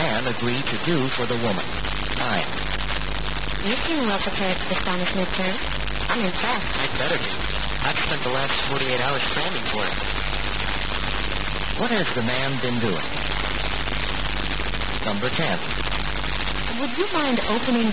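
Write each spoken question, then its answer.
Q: What has the man been doing?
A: Studying intensively for the Spanish midterm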